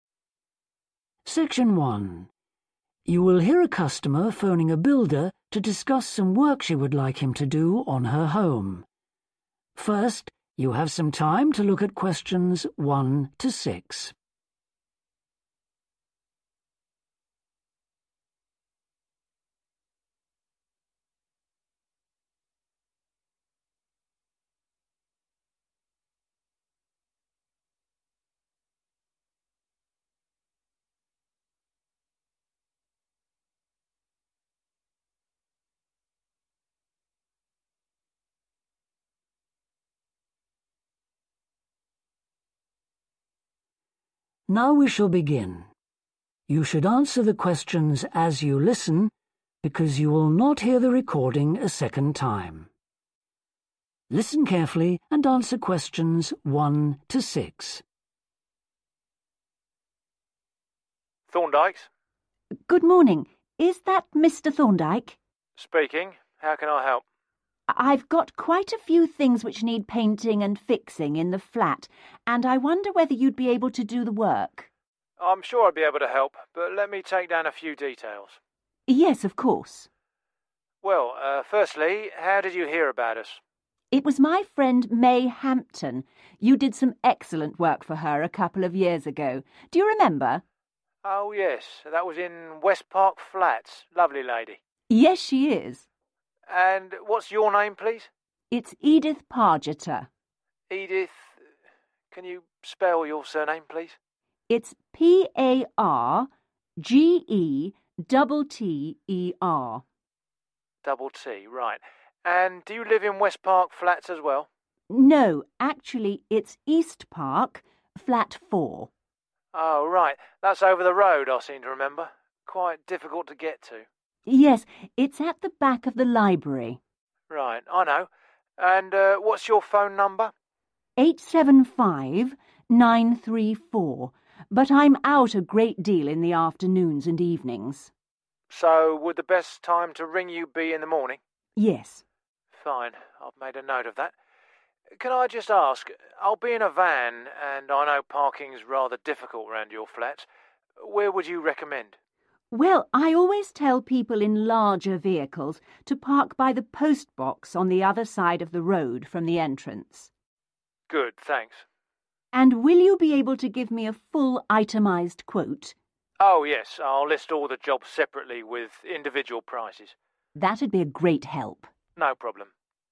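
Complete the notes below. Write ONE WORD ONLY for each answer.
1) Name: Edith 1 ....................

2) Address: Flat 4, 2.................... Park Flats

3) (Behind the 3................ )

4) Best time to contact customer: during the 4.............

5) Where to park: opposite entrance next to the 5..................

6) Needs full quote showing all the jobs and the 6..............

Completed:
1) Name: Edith Pargetter
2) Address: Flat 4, East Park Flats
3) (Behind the library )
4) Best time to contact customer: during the morning
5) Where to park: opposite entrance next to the postbox
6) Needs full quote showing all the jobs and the prices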